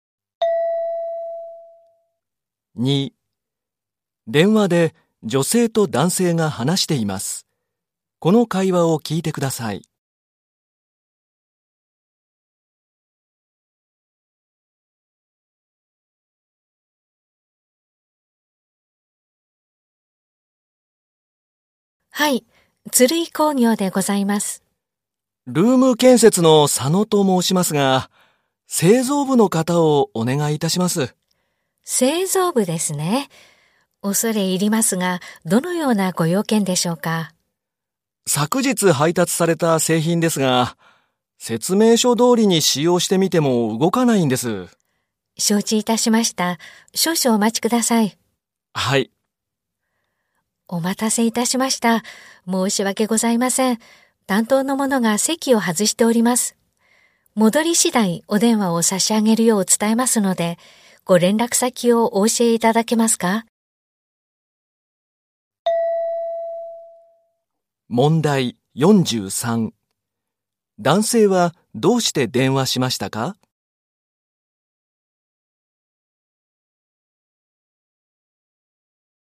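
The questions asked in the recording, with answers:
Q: 男性はどうして電話しましたか?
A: 配達された製品が動かないから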